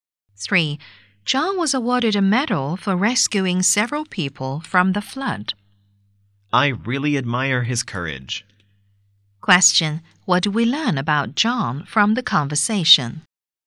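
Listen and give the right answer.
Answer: He was brave and rescued several people from the flood.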